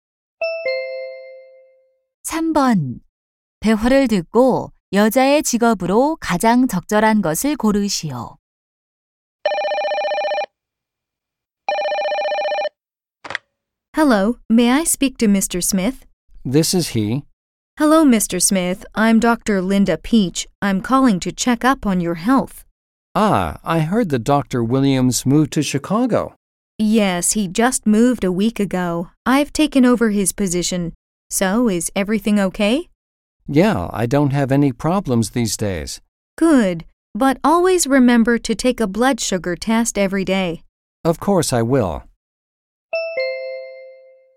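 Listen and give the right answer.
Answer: 의사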